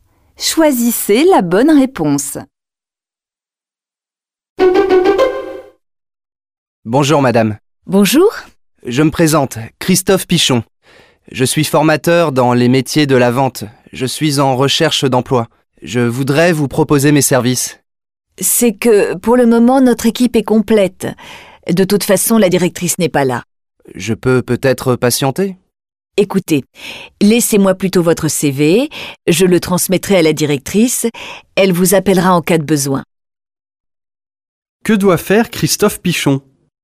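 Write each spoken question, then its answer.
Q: Que doit faire Christophe Pichon ?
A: Laisser son CV (pour la directrice)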